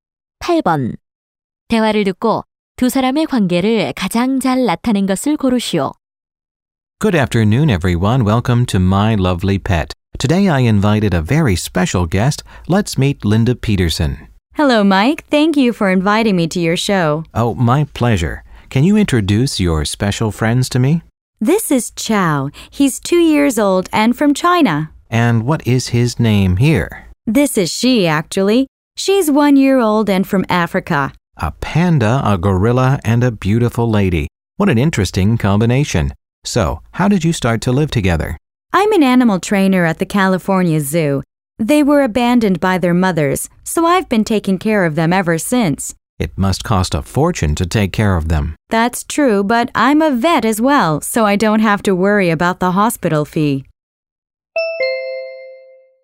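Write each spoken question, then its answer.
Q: 대화를 듣고 두 사람의 관계를 가장 잘 나타낸 것을 고르시오.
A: 쇼 진행자 - 출연자(동물 조련사)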